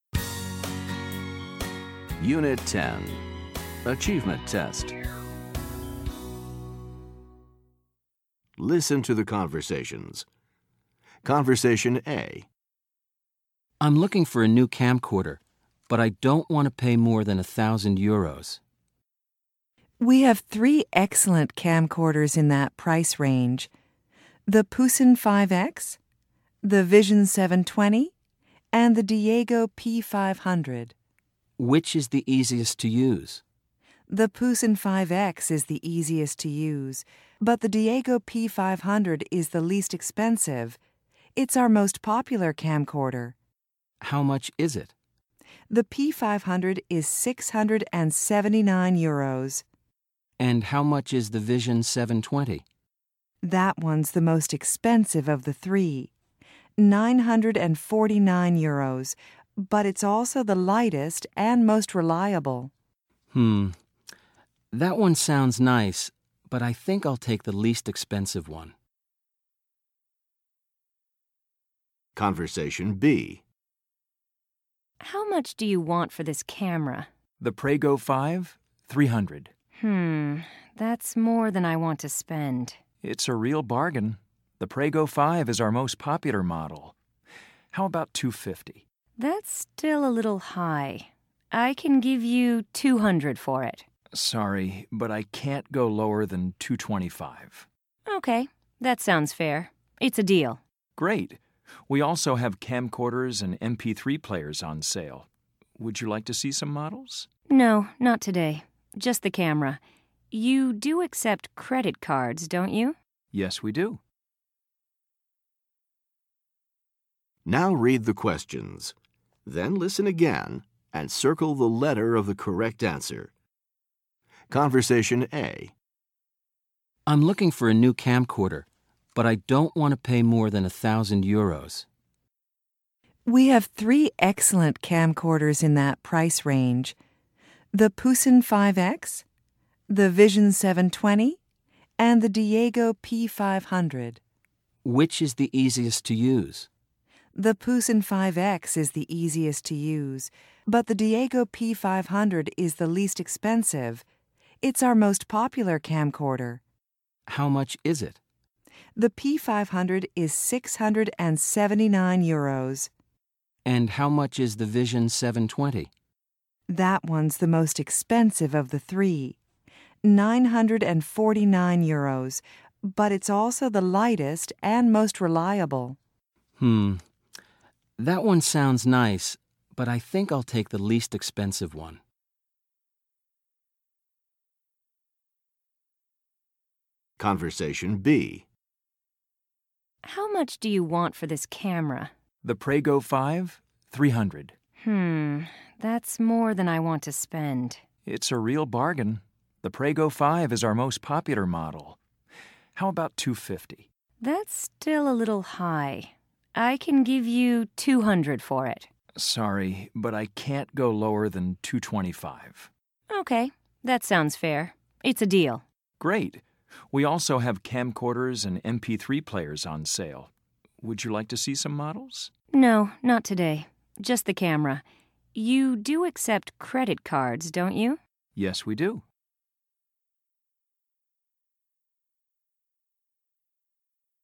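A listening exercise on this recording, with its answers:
Listen to the conversations. Choose the correct answers.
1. How much does the man plan to spend?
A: no more than 1,000 euros

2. Which camcorder is the easiest to use?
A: the Pusen 5X

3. Which camcorder is the most popular?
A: the Diego P500

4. Which camcorder does he buy?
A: the Diego P500 (the least expensive)

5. What does the woman want to buy?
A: a camera (the Prego 5)

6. How much does she pay for it?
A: 225

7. How does she pay for it?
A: by credit card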